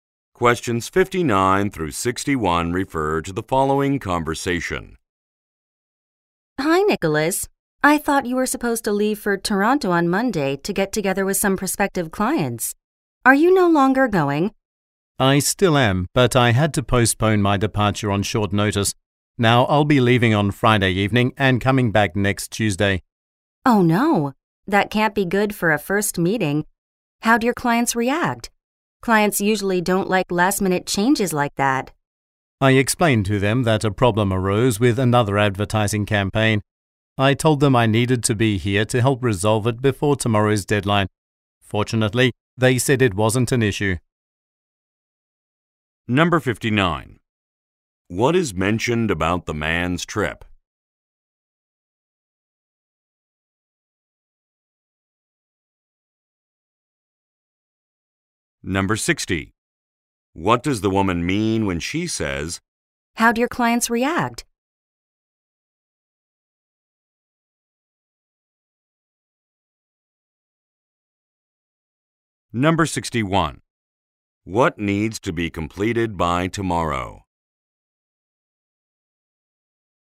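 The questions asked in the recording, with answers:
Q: What is mentioned about the man's trip?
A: It was postponed

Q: What needs to be completed by tomorrow?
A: An advertising campaign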